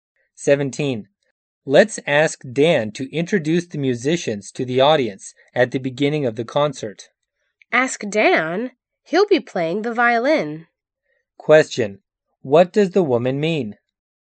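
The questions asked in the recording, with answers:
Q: What does the woman mean?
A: Dan can't introduce the musicians because he will be playing the violin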